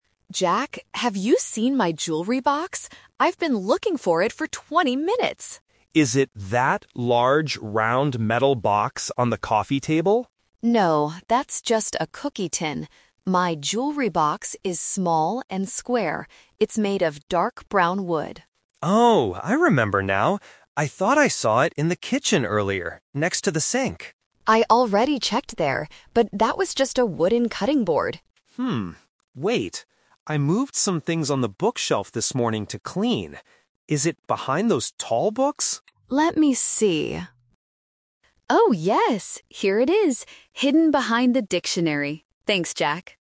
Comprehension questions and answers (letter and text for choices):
Listen to the conversation and choose the correct answer (A, B, or C).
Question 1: What does the jewelry box look like?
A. It is large and round.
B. It is small and square.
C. It is small and round.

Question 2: What is the jewelry box made of?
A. Metal.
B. Plastic.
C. Wood.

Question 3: Where did Emma finally find the jewelry box?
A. On the coffee table.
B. On the bookshelf.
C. In the kitchen.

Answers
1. B. It is small and square.
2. C. Wood.
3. B. On the bookshelf.

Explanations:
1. Emma clearly describes it: "My jewelry box is small and square." The Trap: Option (A) is a trap because Jack mentions a "large, round" box first, but that was a cookie tin.
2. Emma says it is made of "dark brown wood." The Trap: Option (A) "Metal" refers to the cookie tin. The "wooden cutting board" in the kitchen also uses the word "wood" to distract the listener.
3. At the end, Emma finds it "behind the dictionary" on the bookshelf. The Trap: Option (C) is a trap because Jack thought it was in the kitchen, but it wasn't. Option (A) is where the cookie tin was located.

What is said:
Emma: Jack, have you seen my jewelry box? I've been looking for it for twenty minutes!
Jack: Is it that large, round metal box on the coffee table?
Emma: No, that's just a cookie tin. My jewelry box is small and square. It's made of dark brown wood.
Jack: Oh, I remember now. I thought I saw it in the kitchen earlier, next to the sink.
Emma: I already checked there, but that was just a wooden cutting board.
wait! I moved some things on the bookshelf this morning to clean. Is it behind those tall books?
Emma: Let me see... Oh, yes! Here it is, hidden behind the dictionary. Thanks, Jack!